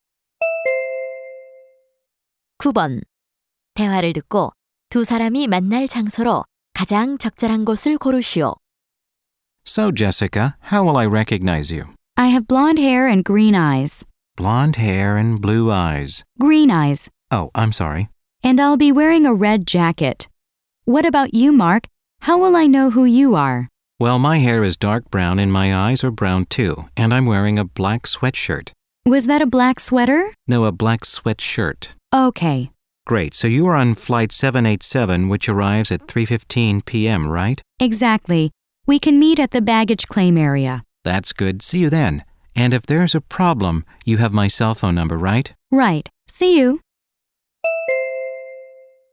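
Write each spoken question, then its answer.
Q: 대화를 듣고 두 사람이 만날 장소로 가장 적절한 곳을 고르시오.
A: 공항 수하물 찾는 곳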